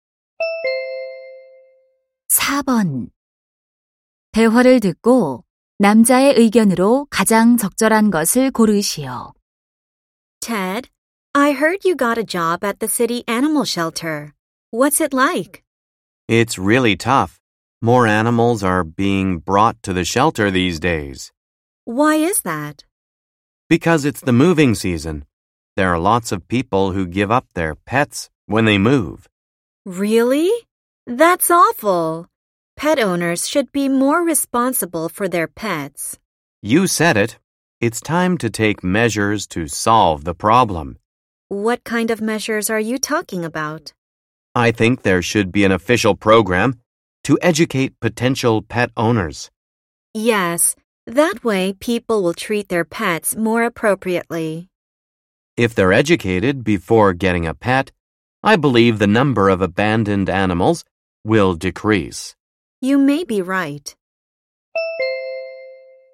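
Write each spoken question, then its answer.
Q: 대화를 듣고 남자의 의견으로 가장 적절한 것을 고르시오.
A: 예비 반려동물 주인을 교육하는 공식 프로그램이 필요하다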